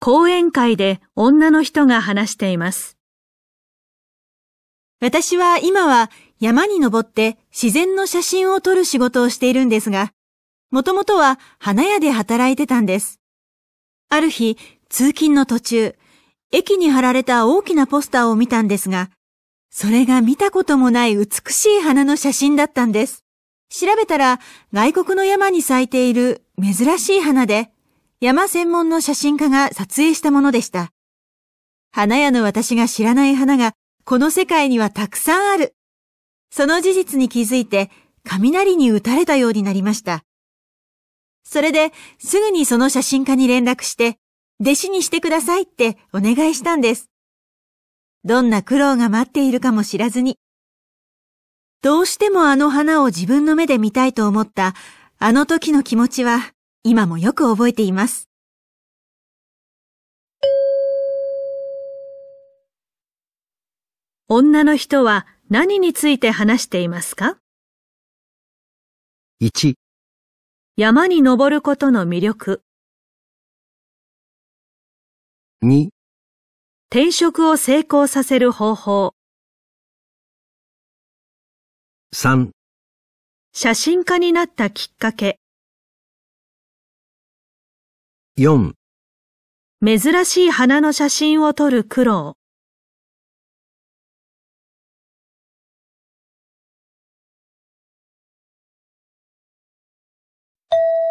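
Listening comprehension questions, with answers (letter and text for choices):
女の人は何について話していますか。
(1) 山に登ることの魅力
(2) 転職を成功させる方法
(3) 写真家になったきっかけ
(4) 珍しい花の写真を撮る苦労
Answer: (3) 写真家になったきっかけ

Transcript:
講演会で女の人が話しています。
女:私は今は山に登って自然の写真を撮る仕事をしているんですが、もともとは花屋で働いて たんです。ある日、通勤の途中、駅に張られた大きなポスターを見たんですが、それが見たこ ともない美しい花の写真だったんです。調べたら外国の山に咲いている珍しい花で山専門の写 真家が撮影したものでした。花屋の私が知らない花がこの世界にはたくさんある。その事実に 気づいて雷に打たれたようになりました。それですぐにその写真家に連絡して、弟子にしてく ださいってお願いしたんです。どんな苦労が待っているかも知らずに。どうしてもあの花を自 分の目で見たいたいと思った、あの時の気持ちは今もよく覚えています。

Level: N2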